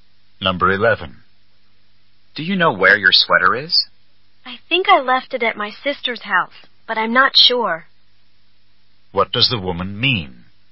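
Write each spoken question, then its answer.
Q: What does the woman mean?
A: She's not sure, but she may have left it at her sister's house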